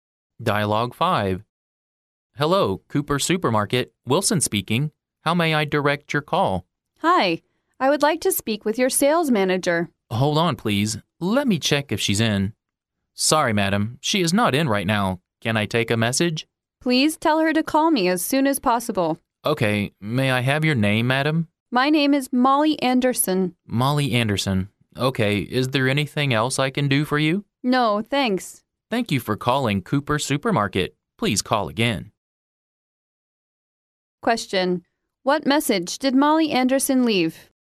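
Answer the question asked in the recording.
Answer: She asked the sales manager to call her back as soon as possible.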